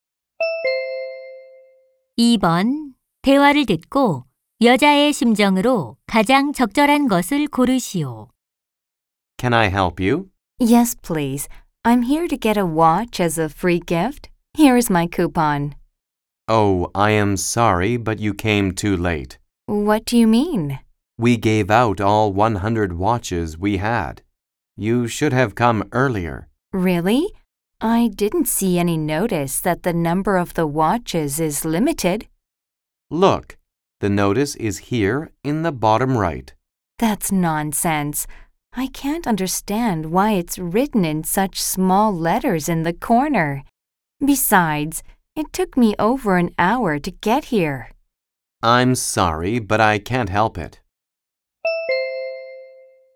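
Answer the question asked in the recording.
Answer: 짜증나고 화남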